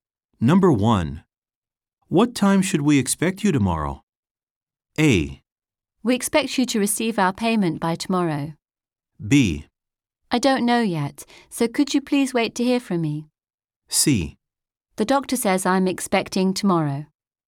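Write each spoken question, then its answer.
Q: What time should we expect you tomorrow?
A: B: I don't know yet, so could you please wait to hear from me?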